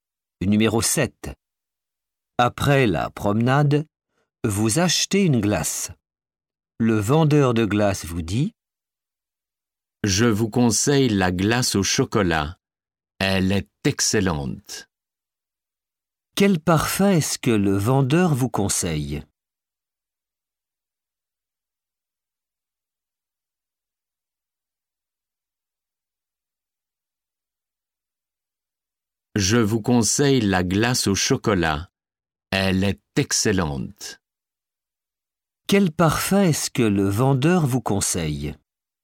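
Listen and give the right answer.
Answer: Chocolat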